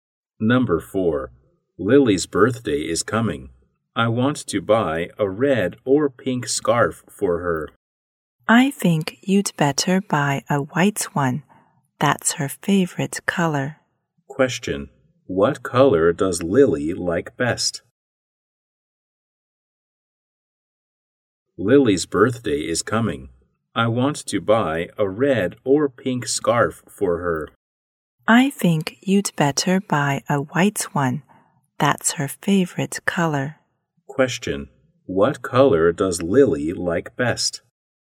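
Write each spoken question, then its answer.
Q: What color does Lily like best?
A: White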